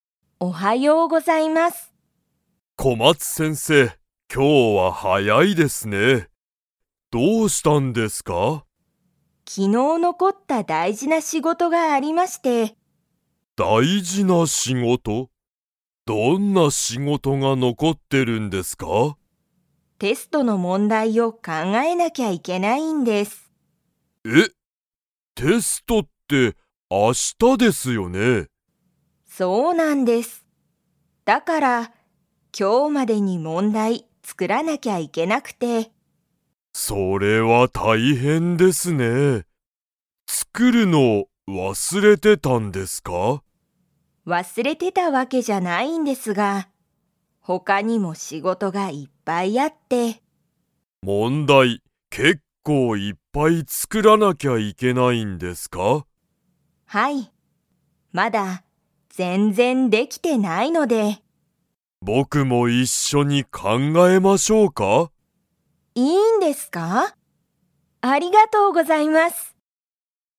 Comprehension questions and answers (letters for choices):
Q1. 小松先生こまつせんせいは、____がある。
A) 大事だいじな仕事しごと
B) 今日きょうのテスト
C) 大変たいへんな学校がっこう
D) 明日あしたの勉強べんきょう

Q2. 大西先生おおにしせんせいは、小松先生こまつせんせいと一緒いっしょにテストの問題もんだいを考かんがえますか?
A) はい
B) いいえ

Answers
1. A
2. A

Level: Level 2